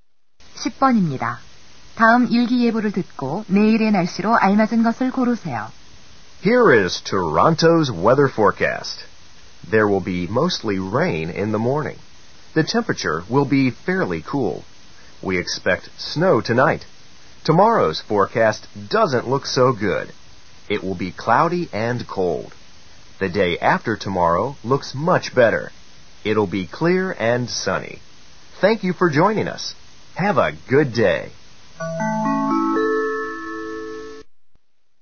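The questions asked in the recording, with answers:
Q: 다음 일기예보를 듣고 내일의 날씨로 알맞은 것을 고르세요.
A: 흐리고 추움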